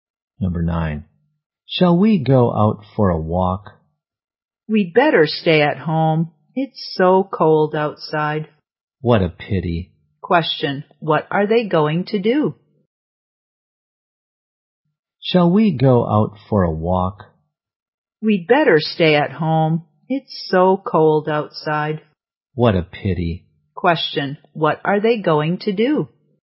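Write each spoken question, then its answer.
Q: Question. What are they going to do?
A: Stay at home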